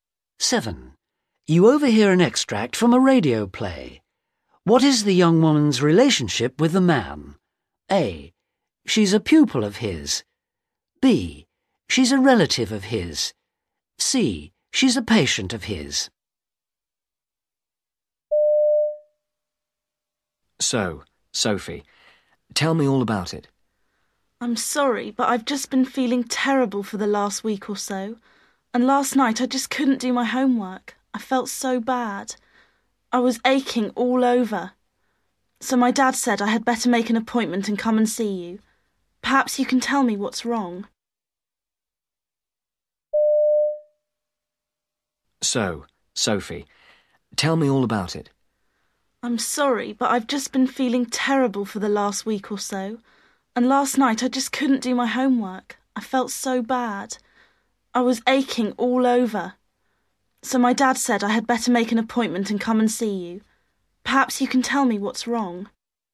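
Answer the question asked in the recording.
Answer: C: She's a patient of his.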